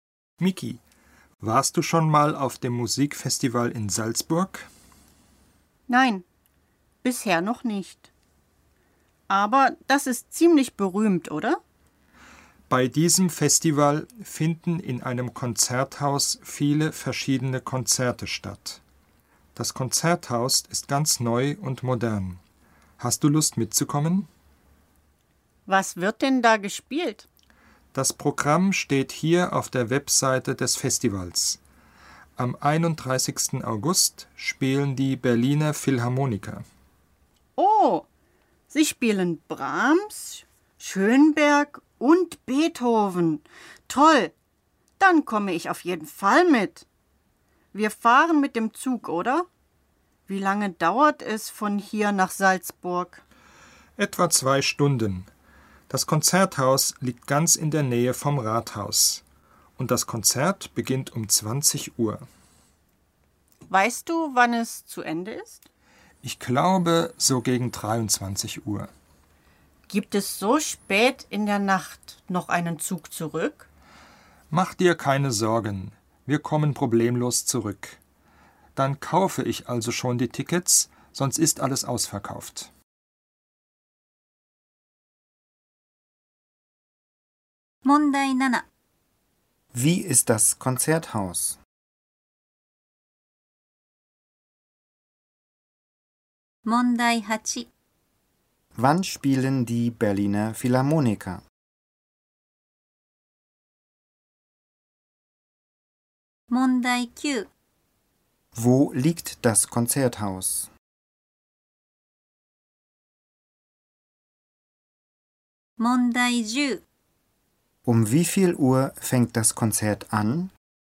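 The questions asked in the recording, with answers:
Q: Wie ist das Konzerthaus?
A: neu und modern

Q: Wann spielen die Berliner Philharmoniker?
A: Am 31. August

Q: Wo liegt das Konzerthaus?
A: In der Nähe vom Rathaus

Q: Um wie viel Uhr fängt das Konzert an?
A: Um 20 Uhr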